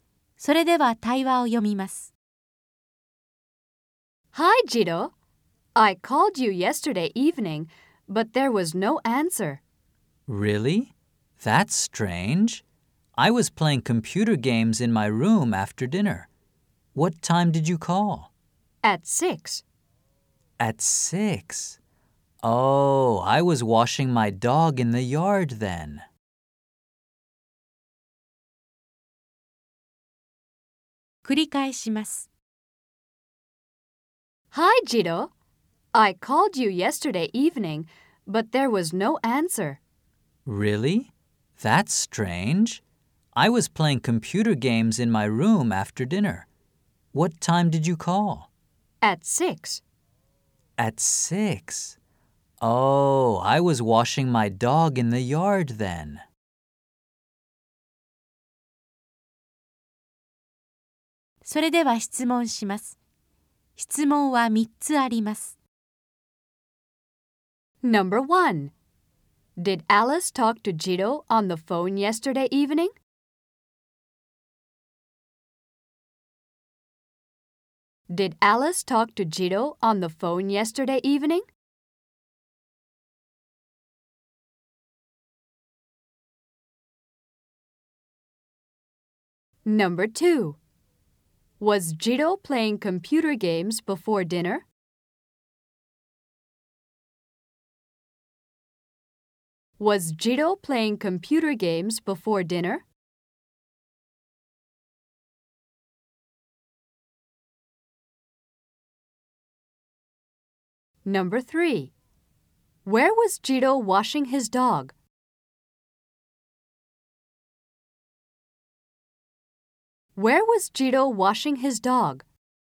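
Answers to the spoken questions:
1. No, she didn't.
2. No, he wasn't.
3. In the yard.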